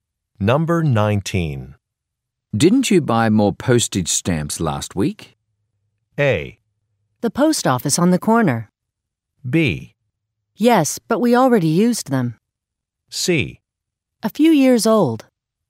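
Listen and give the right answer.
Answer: B: Yes, but we already used them.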